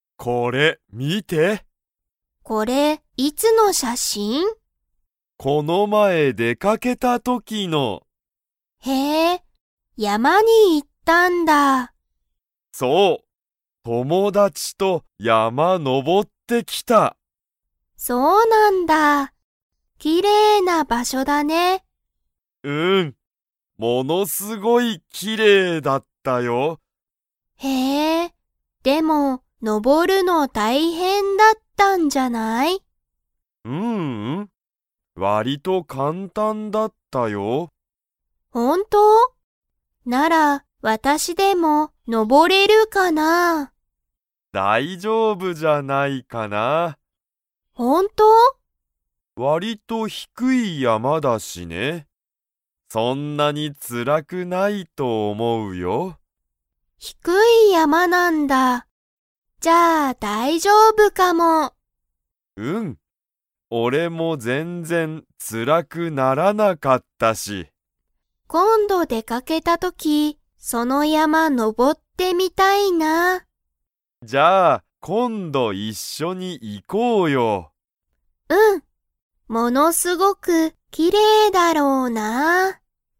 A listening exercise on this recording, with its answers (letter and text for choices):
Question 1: タカシは、どんな山やまにのぼりましたか?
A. 低ひくい山やま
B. 高たかい山やま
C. 新あたらしい山やま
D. 古ふるい山やま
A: A. 低ひくい山やま

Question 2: ユキは山やまに 。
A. のぼってみたい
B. のぼってみたくない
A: A. のぼってみたい

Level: Level 3